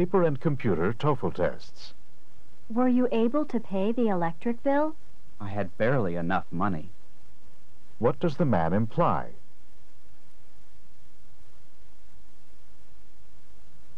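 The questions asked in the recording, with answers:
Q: What does the man imply?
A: He had just enough money to pay the bill.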